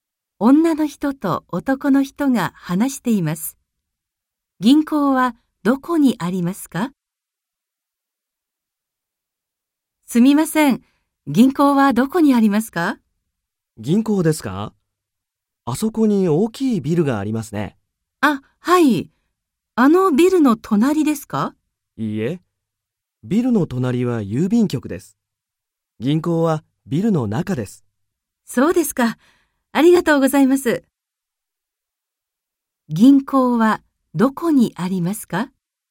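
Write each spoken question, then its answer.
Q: 銀行はどこにありますか?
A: 大きいビルの中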